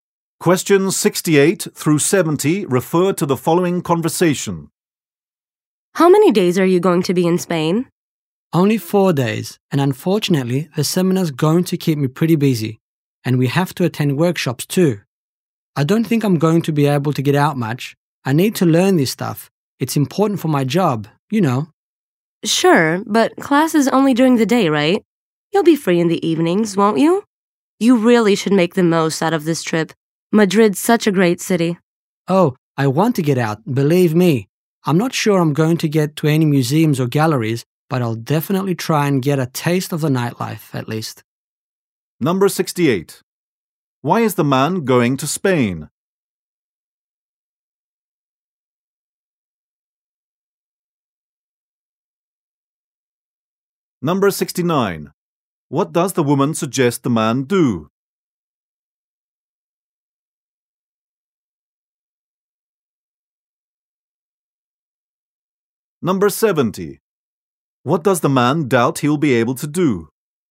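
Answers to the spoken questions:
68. To attend a seminar
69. Make the most of the trip and go out in the evenings
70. Visit museums or galleries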